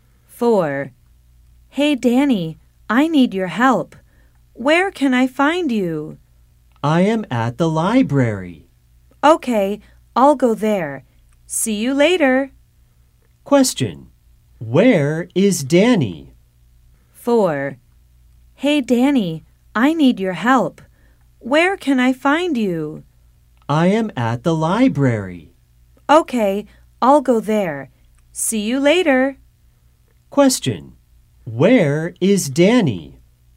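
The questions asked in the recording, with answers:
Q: Where is Danny?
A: At the library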